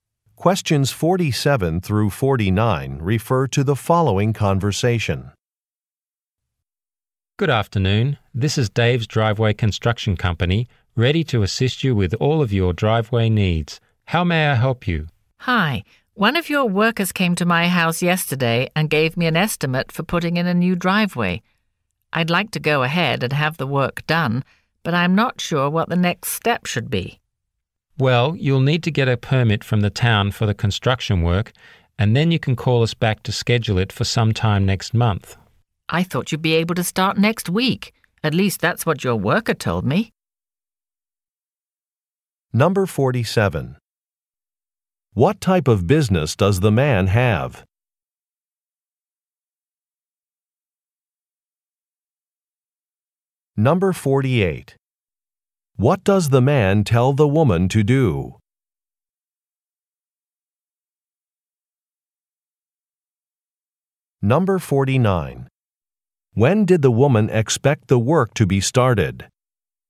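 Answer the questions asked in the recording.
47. Driveway construction
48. Get a permit from the town
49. Next week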